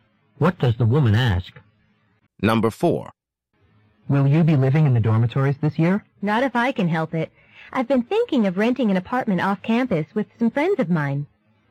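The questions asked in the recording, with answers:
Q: What does the woman imply?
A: She would rather not live in the dormitories; she plans to rent an apartment off campus with friends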